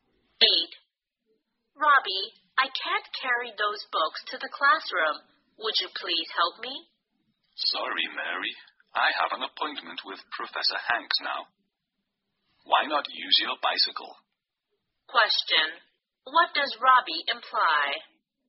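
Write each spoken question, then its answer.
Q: What does Robbie imply?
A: He can't help; Mary should carry the books on her bicycle.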